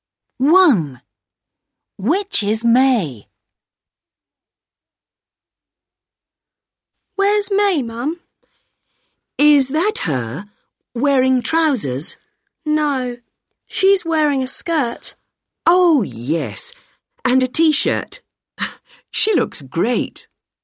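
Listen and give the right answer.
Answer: The girl wearing a skirt and a T-shirt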